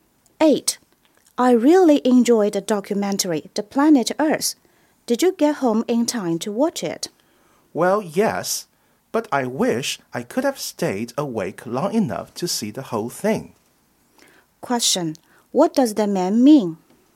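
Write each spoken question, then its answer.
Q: What does the man mean?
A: He fell asleep before the documentary ended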